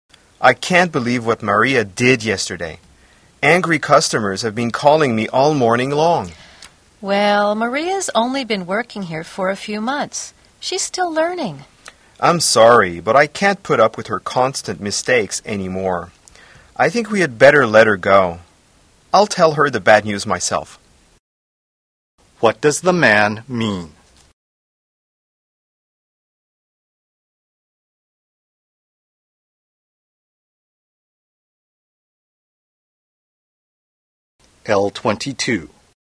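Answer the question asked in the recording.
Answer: Maria should be fired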